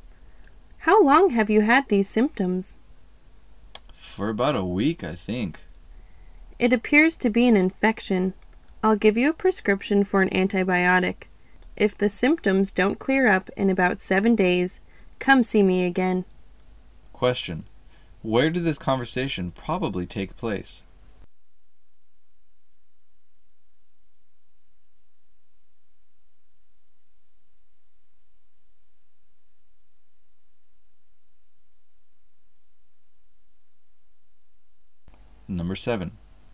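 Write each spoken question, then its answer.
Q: Where did this conversation probably take place?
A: In a doctor's office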